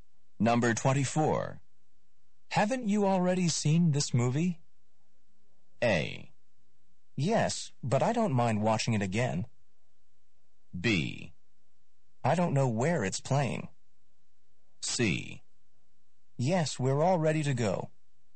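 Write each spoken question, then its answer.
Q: Haven't you already seen this movie?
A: A: Yes, but I don't mind watching it again.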